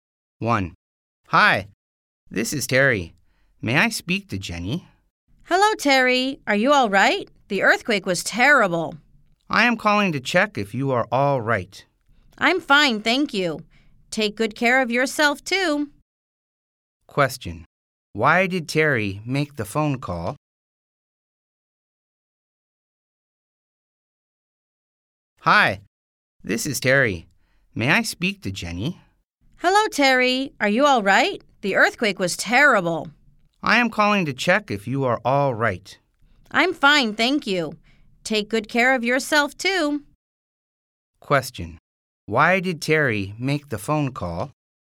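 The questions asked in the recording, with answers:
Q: Why did Terry make the phone call?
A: To check if Jenny was all right after the earthquake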